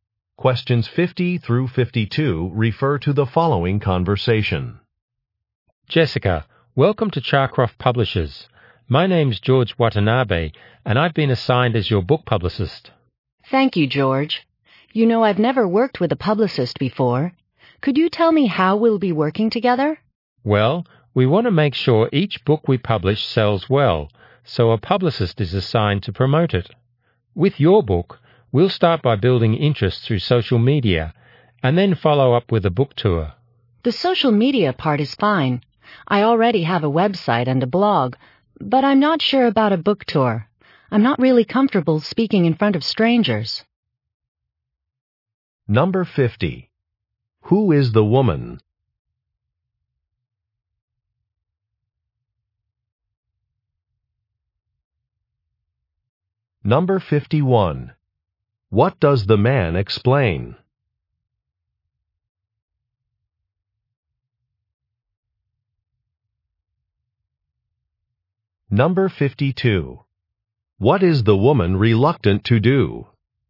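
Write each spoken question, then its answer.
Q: Who is the woman?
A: An author

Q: What does the man explain?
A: How a publicist will promote her book

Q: What is the woman reluctant to do?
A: Go on a book tour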